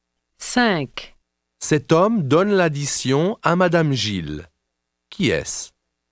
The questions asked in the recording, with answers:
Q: Qui est-ce?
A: C'est un serveur.